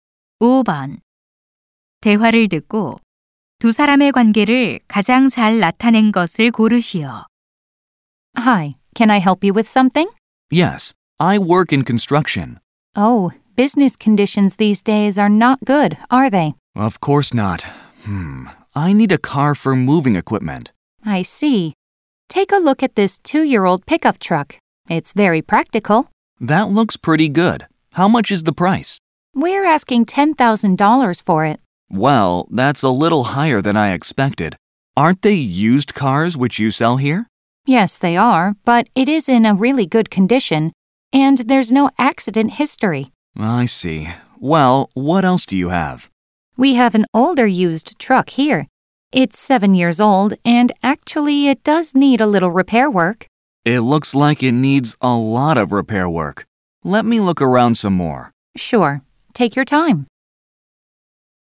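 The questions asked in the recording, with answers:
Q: 대화를 듣고 두 사람의 관계를 가장 잘 나타낸 것을 고르시오.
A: 중고차 판매원 - 손님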